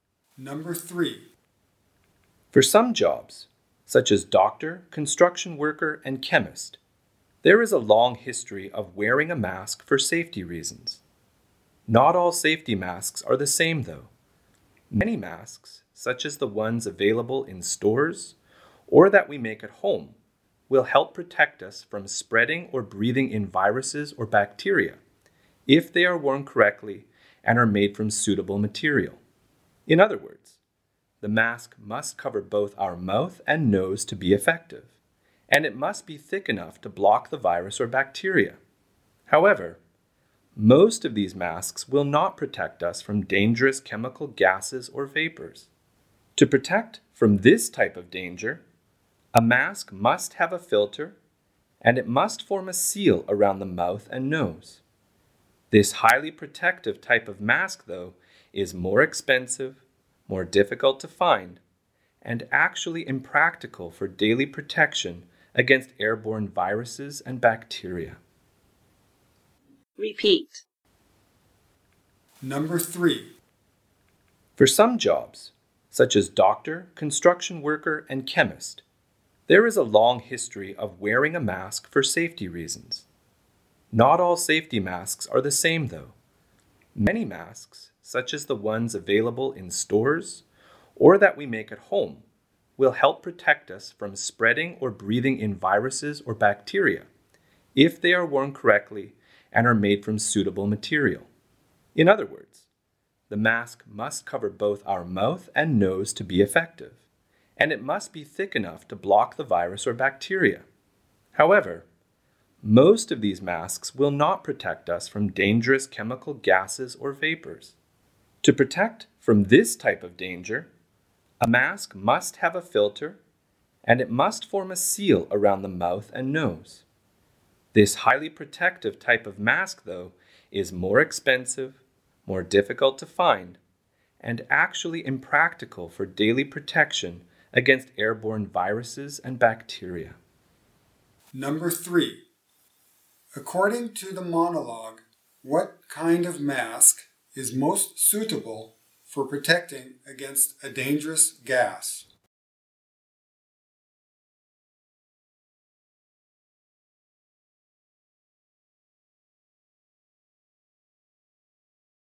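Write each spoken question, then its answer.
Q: According to the monologue, what kind of mask is most suitable for protecting against a dangerous gas?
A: A mask with a filter that seals around the mouth and nose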